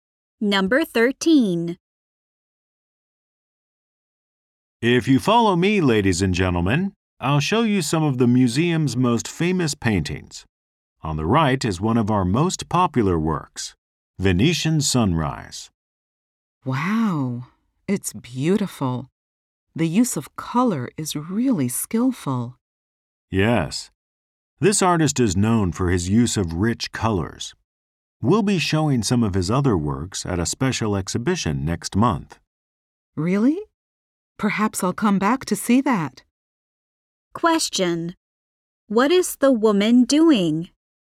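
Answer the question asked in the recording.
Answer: Taking a museum tour, looking at paintings.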